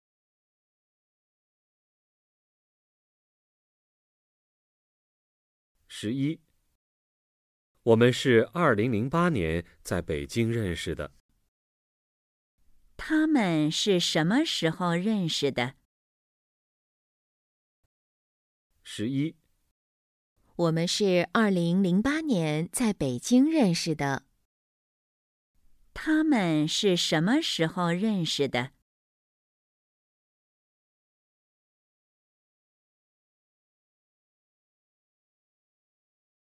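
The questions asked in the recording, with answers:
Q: 他们是什么时候认识的?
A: 2008年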